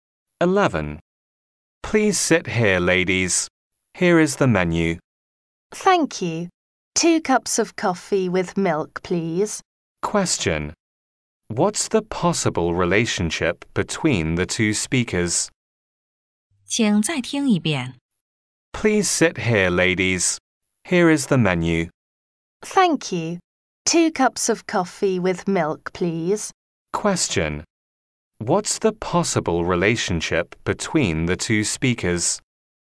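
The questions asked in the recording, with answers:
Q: What's the possible relationship between the two speakers?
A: Waiter and customers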